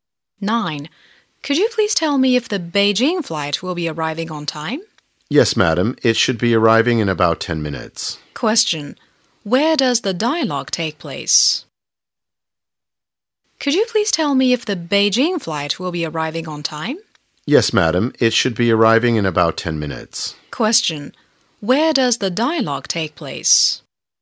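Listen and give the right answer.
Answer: At the airport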